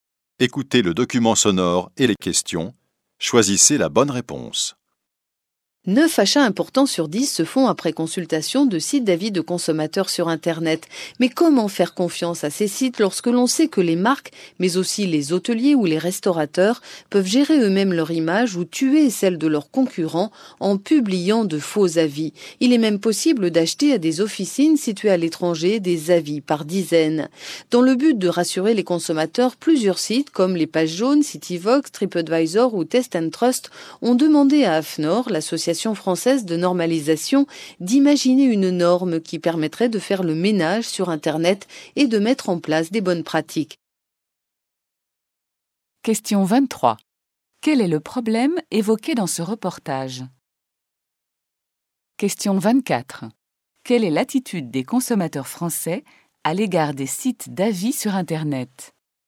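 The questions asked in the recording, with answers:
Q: Quel est le problème évoqué dans ce reportage?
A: Les faux avis publiés sur les sites d'avis de consommateurs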